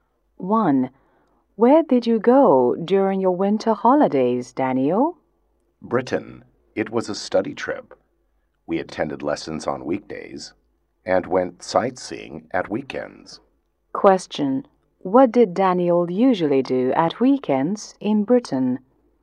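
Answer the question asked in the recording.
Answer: He went sightseeing.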